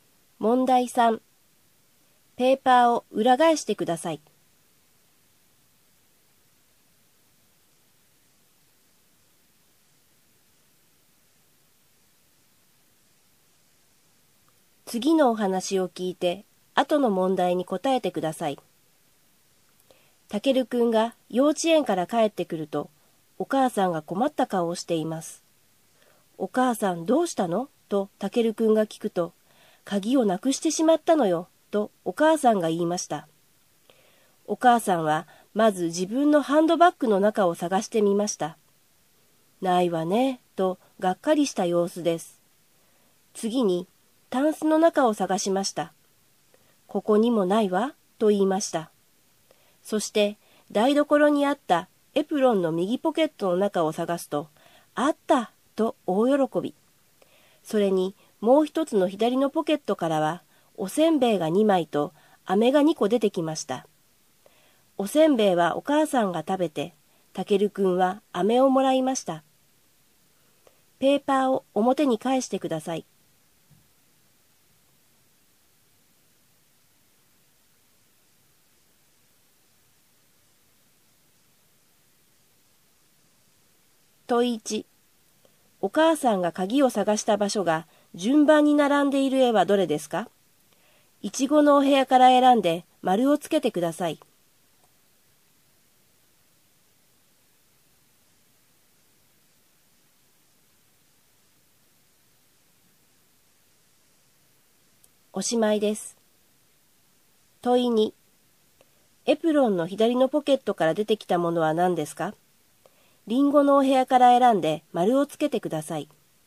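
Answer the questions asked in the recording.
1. ハンドバッグ、タンス、エプロンのポケットの順
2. おせんべい2枚と飴2個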